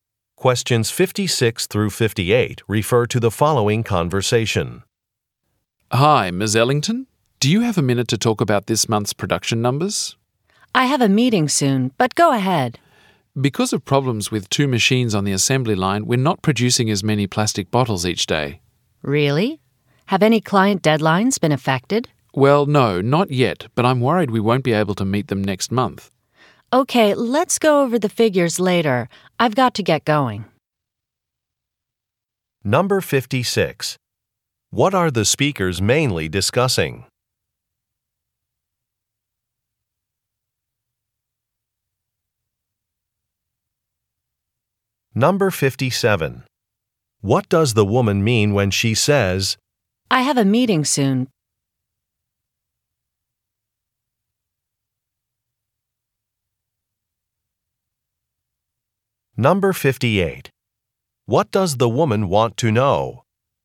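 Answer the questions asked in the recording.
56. Reduced production due to machine problems
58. Whether client deadlines have been affected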